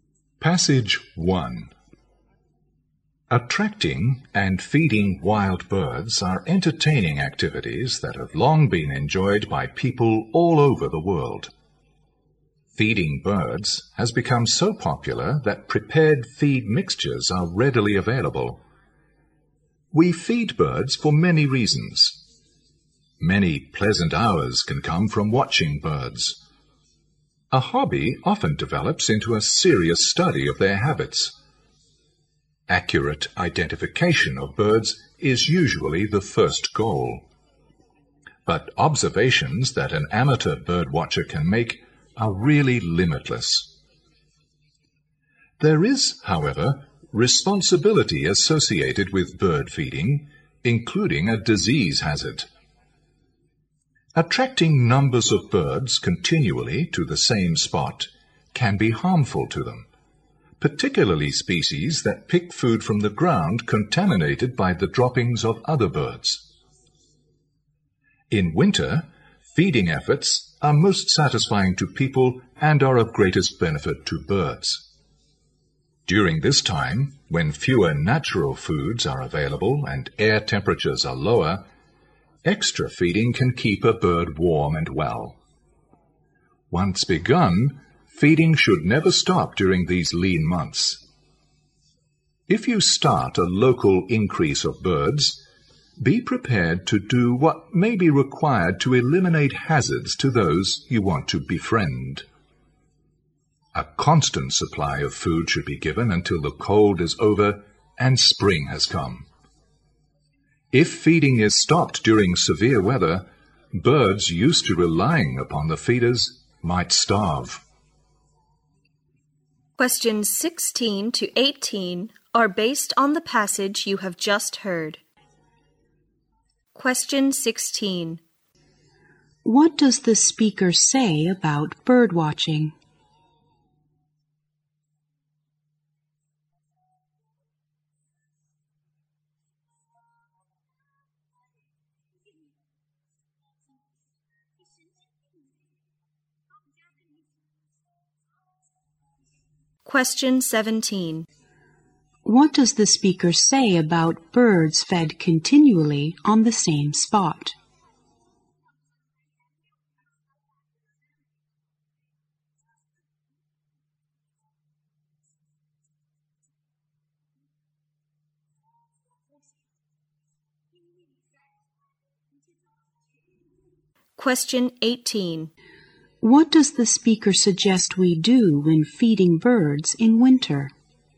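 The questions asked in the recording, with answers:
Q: What does the speaker say about bird watching?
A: It can develop into a serious study of birds' habits.

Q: What does the speaker say about birds fed continually on the same spot?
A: They may catch diseases.

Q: What does the speaker suggest we do when feeding birds in winter?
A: Keep feeding them until spring comes.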